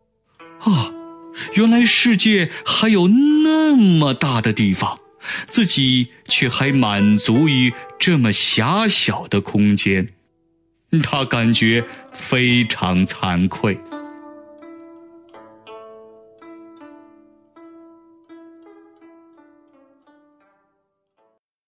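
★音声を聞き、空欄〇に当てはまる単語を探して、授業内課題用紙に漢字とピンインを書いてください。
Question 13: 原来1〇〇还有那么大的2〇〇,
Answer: 1世界 2地方

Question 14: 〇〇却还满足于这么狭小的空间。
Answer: 自己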